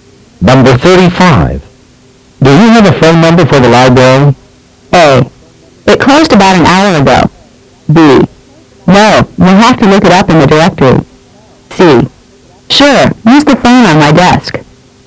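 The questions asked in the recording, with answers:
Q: Do you have a phone number for the library?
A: B: No, we'll have to look it up in the directory.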